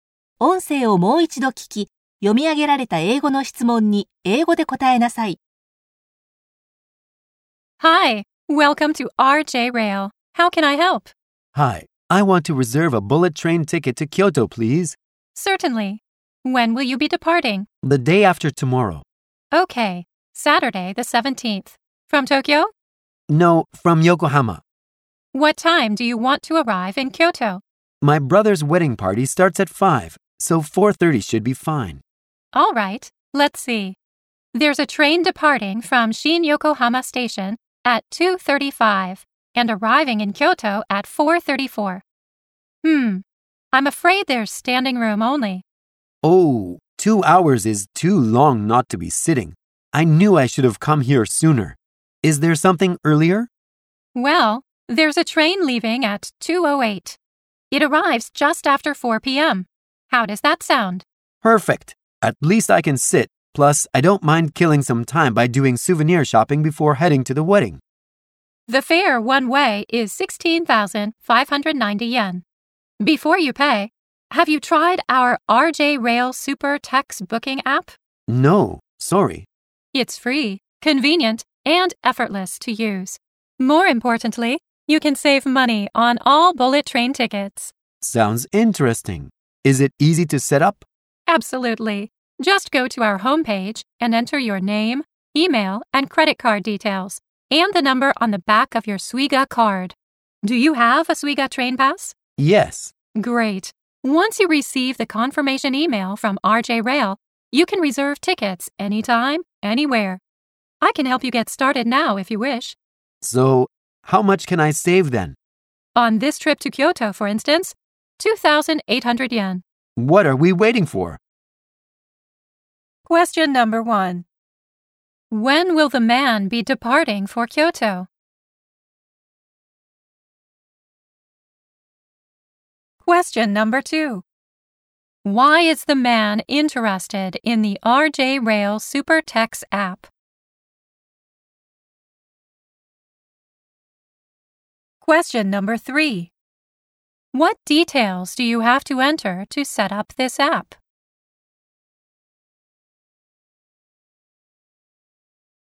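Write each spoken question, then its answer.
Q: When will the man be departing for Kyoto?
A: On Saturday the 17th, the day after tomorrow.

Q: Why is the man interested in the RJ Rail Super Tex app?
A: Because he can save money on bullet train tickets (2,800 yen on this trip).

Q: What details do you have to enter to set up this app?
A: Your name, email, credit card details, and the number on the back of your Suiga card.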